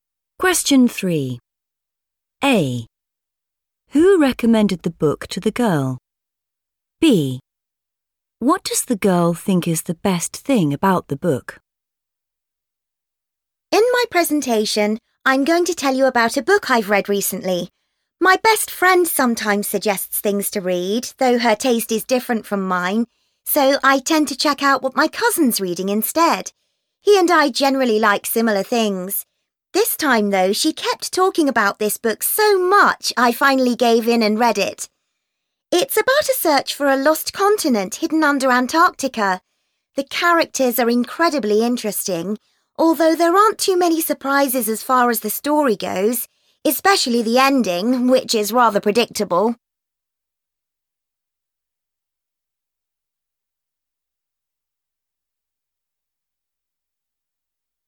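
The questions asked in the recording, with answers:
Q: Who recommended the book to the girl?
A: her best friend

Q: What does the girl think is the best thing about the book?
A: the characters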